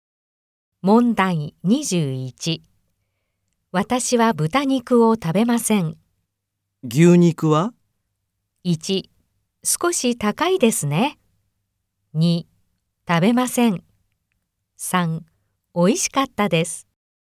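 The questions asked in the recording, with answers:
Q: 私は豚肉を食べません。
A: 2: 食べません。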